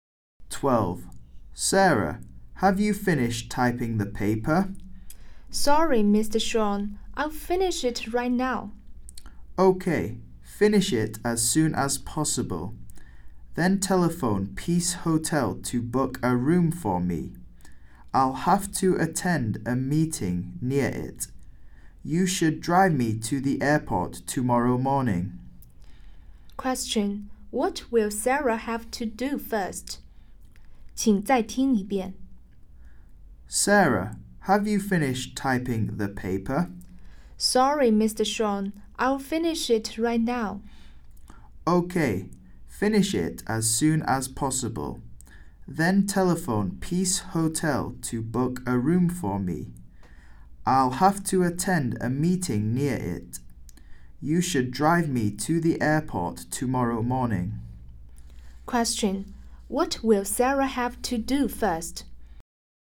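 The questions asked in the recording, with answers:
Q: What will Sarah have to do first?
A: Finish typing the paper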